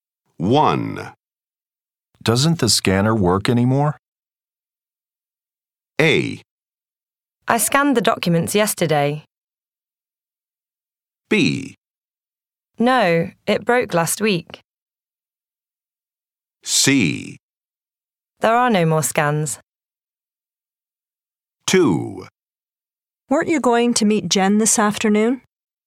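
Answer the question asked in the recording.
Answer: B: No, it broke last week.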